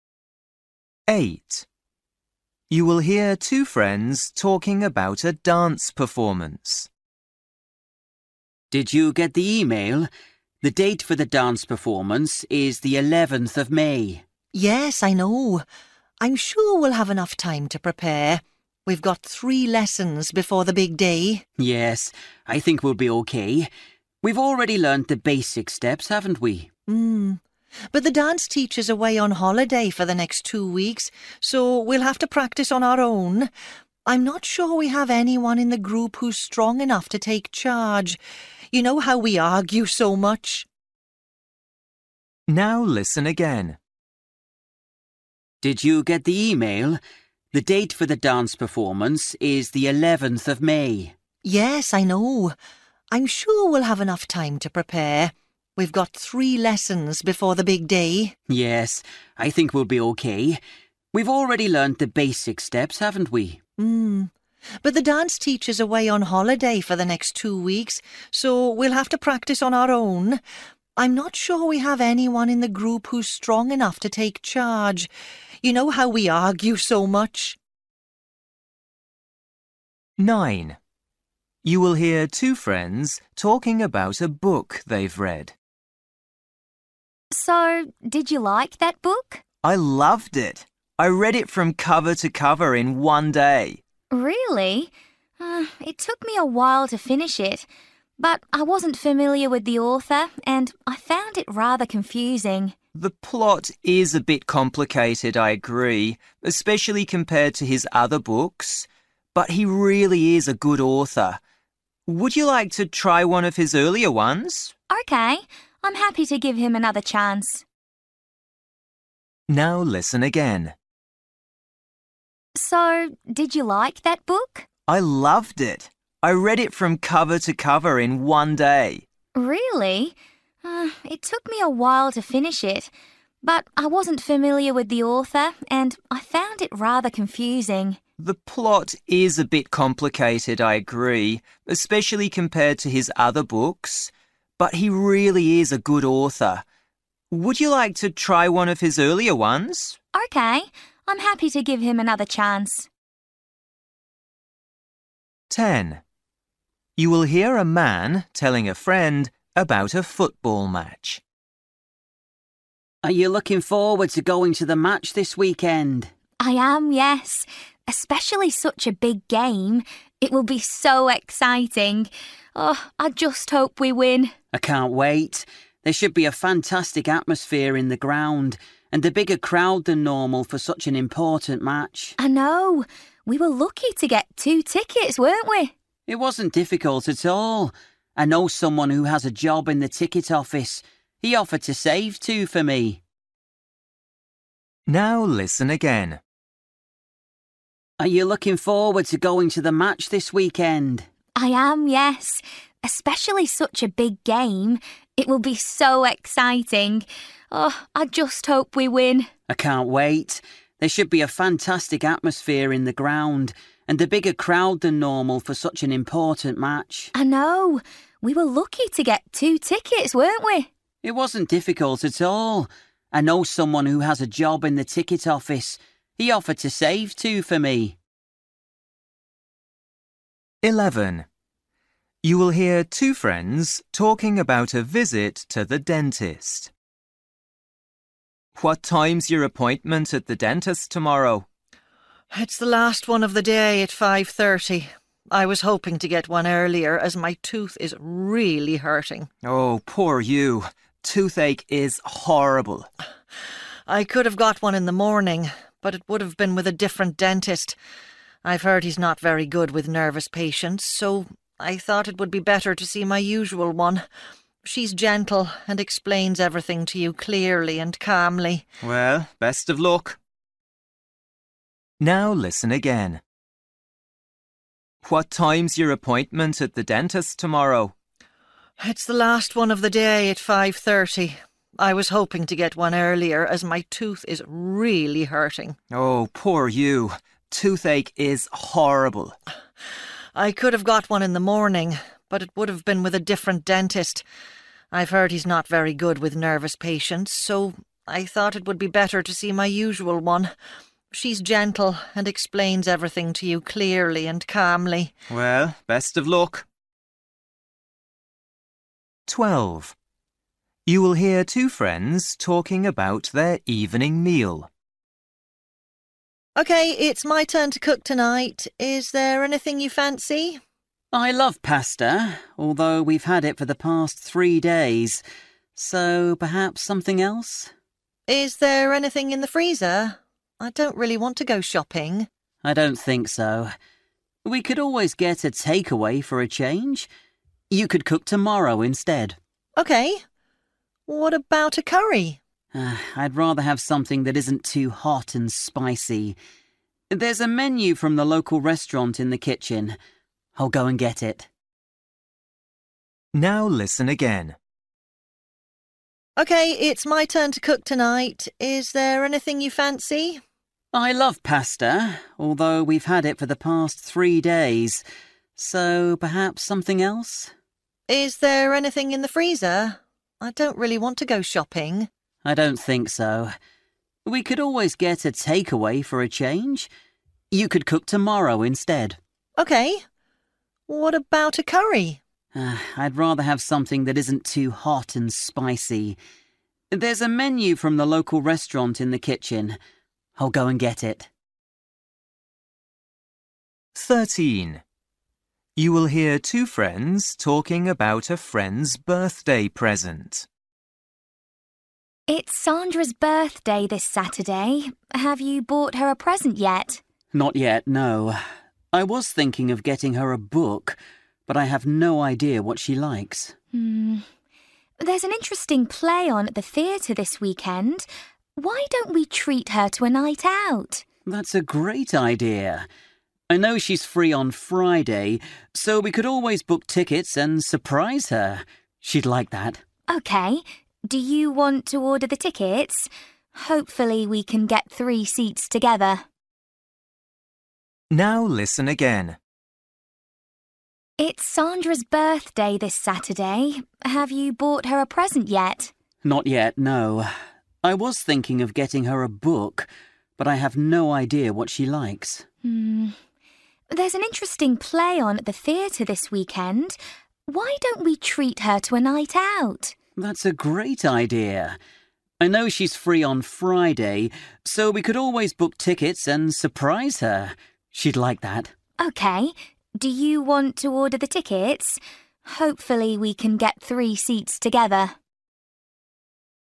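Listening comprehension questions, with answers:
For each question, choose the correct answer.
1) You will hear two friends talking about a dance performance. What is the woman worried about?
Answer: Nobody in the group is strong enough to take charge while the teacher is away.

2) You will hear two friends talking about a book they've read. The man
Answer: is willing to try another book by the same author.

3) You will hear a man telling a friend about a football match. He thinks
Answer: it was easy to get tickets because he knows someone in the ticket office.

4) You will hear two friends talking about a visit to the dentist. What does the woman say about the appointment?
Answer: She chose a later one so she could see her usual dentist.

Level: Luyện nghe trình độ B1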